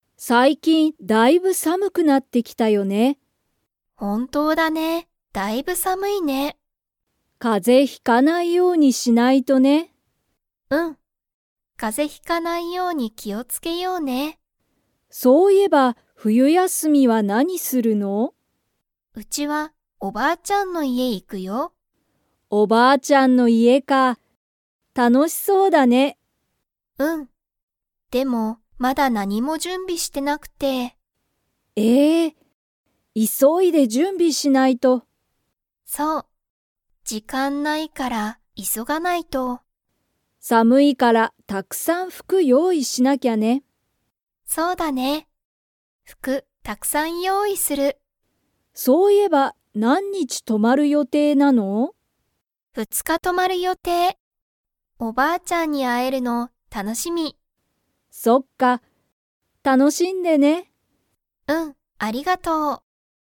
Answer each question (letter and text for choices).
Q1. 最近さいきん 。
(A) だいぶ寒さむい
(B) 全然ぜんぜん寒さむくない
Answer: (A) だいぶ寒さむい

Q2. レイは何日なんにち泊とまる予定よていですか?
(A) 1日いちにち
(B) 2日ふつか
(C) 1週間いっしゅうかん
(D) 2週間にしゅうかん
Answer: (B) 2日ふつか

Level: Level 4